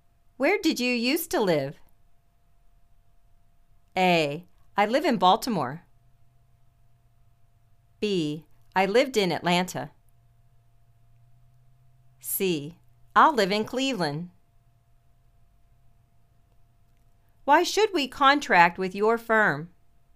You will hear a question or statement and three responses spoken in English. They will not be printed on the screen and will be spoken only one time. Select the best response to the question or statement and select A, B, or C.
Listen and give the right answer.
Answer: I lived in Atlanta.